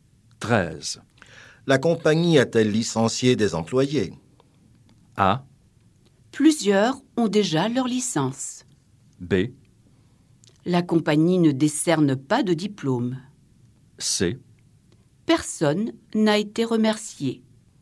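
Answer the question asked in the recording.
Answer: C: Personne n'a été remercié.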